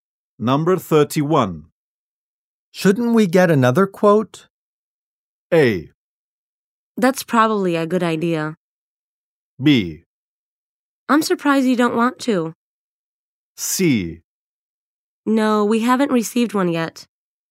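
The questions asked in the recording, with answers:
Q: Shouldn't we get another quote?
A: A: That's probably a good idea.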